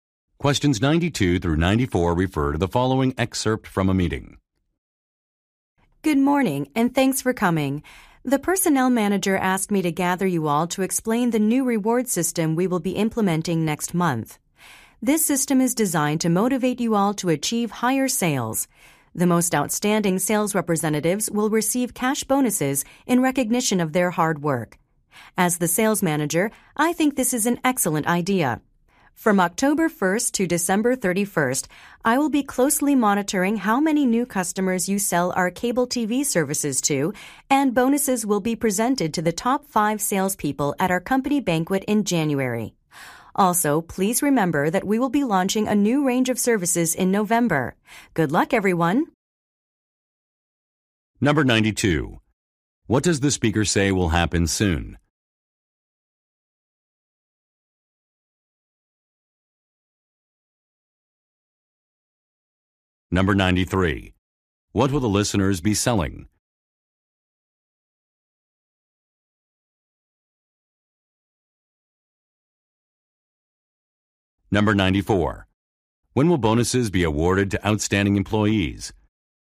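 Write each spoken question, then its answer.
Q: What does the speaker say will happen soon?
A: A new reward system will be implemented

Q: What will the listeners be selling?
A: Cable TV services

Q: When will bonuses be awarded to outstanding employees?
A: In January, at the company banquet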